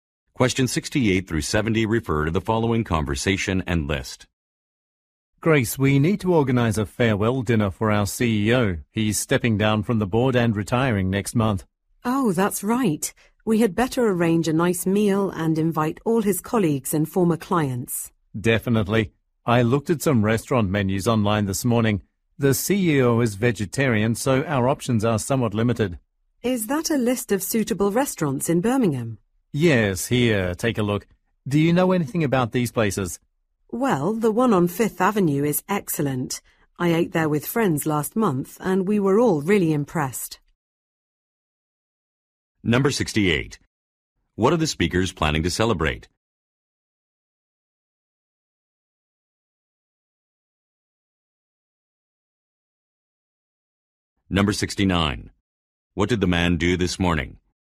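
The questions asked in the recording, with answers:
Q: What are the speakers planning to celebrate?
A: The CEO's retirement

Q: What did the man do this morning?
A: Looked at restaurant menus online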